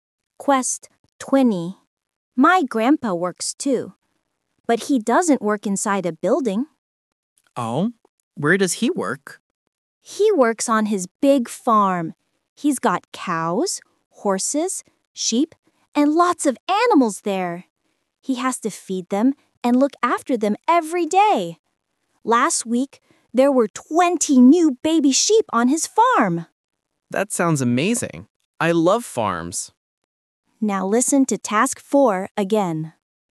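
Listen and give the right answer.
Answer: On his big farm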